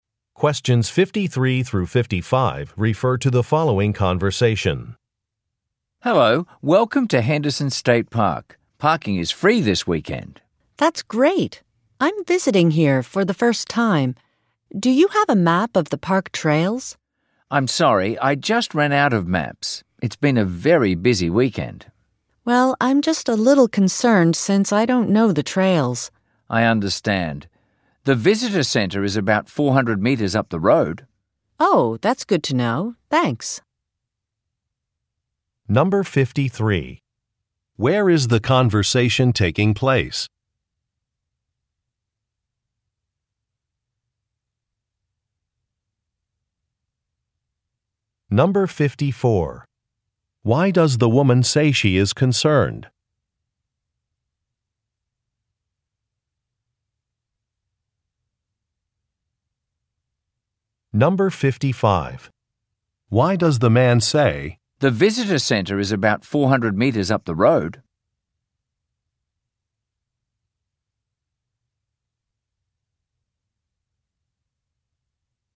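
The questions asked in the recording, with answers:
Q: Where is the conversation taking place?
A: At a state park

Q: Why does the woman say she is concerned?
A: She doesn't know the trails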